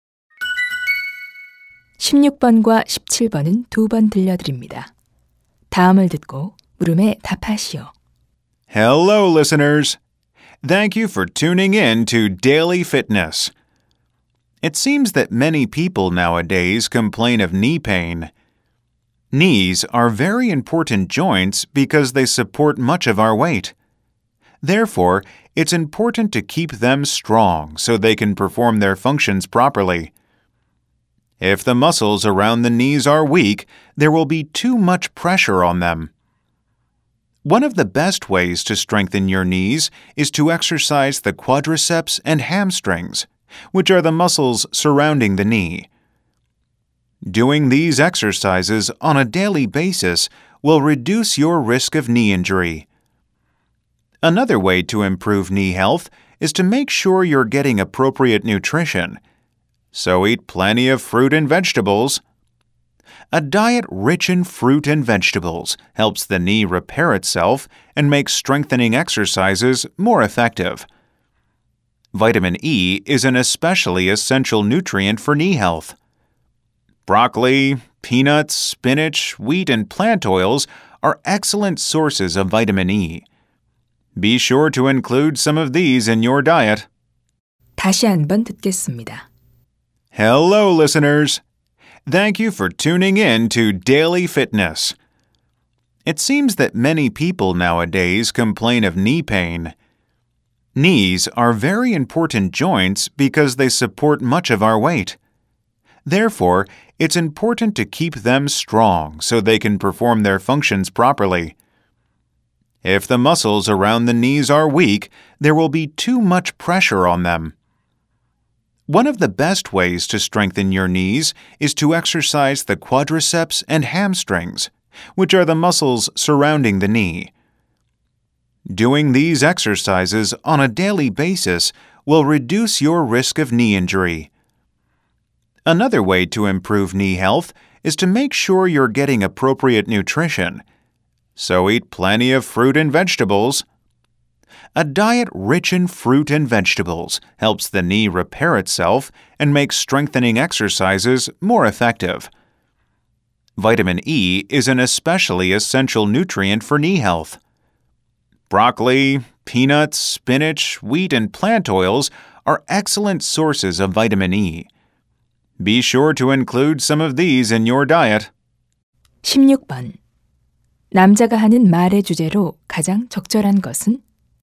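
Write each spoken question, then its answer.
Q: 남자가 하는 말의 주제로 가장 적절한 것은?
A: 무릎 건강을 지키는 방법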